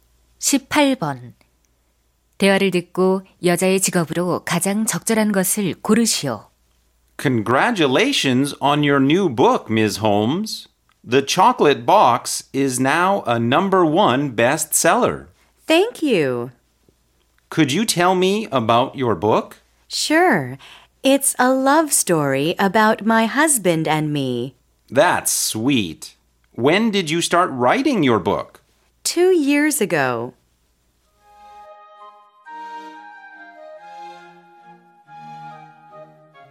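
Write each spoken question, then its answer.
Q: 대화를 듣고 여자의 직업으로 가장 적절한 것을 고르시오.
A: 작가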